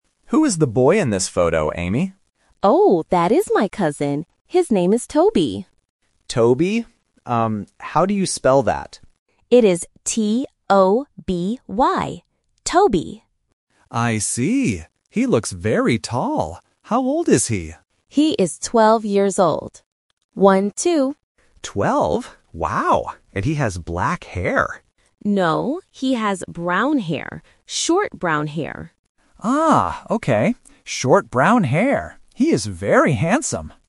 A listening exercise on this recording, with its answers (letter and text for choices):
Two friends, Nick and Amy, are looking at a photo on a phone. Listen to the conversation between Nick and Amy. Choose the correct answer (A, B, or C) for each question.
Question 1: What is the name of Amy's cousin?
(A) Tony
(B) Toby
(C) Tommy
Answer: (B) Toby

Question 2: How old is the cousin?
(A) 2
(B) 12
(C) 20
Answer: (B) 12

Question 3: What does the cousin look like?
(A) He is tall and has brown hair.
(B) He is short and has black hair.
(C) He is tall and has black hair.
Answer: (A) He is tall and has brown hair.

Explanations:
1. Amy clearly spells out the name T-O-B-Y. Option A (Tony) and Option C (Tommy) are traps. They are included because they sound very similar to Toby, testing the listener's ability to catch the exact spelling.
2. Amy says her cousin is "twelve years old" and repeats "one-two" to confirm. Option C (20) is a phonetic trap because "twelve" and "twenty" can sound similar to A1 learners. Option A (2) is also a trap to test if the listener understands "twelve" versus "two".
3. Nick says, "He looks very tall," which confirms the first part. Then, Nick guesses the boy has "black hair" (Option C is the trap). However, Amy corrects him by saying, "No, he has brown hair." Therefore, Option A is the only correct and fully accurate description.